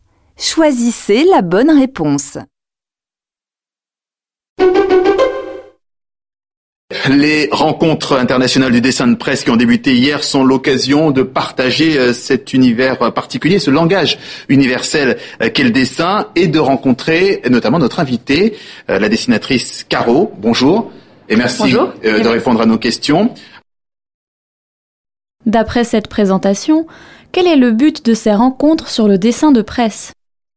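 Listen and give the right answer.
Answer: Partager l'univers du dessin de presse, ce langage universel, et rencontrer des dessinateurs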